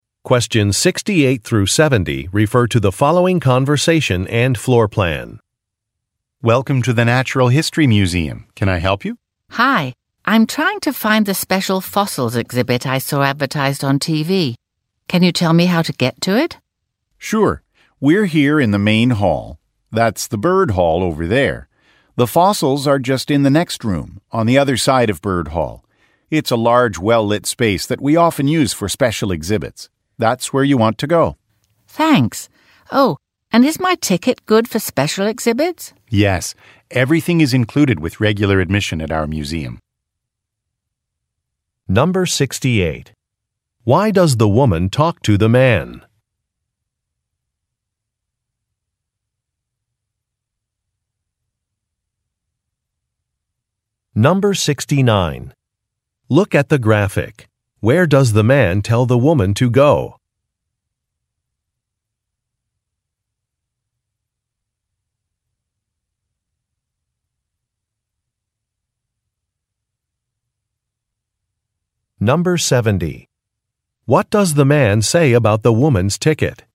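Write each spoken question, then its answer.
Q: Why does the woman talk to the man?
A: To ask for directions to the special fossils exhibit

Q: What does the man say about the woman's ticket?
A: It covers special exhibits; everything is included with regular admission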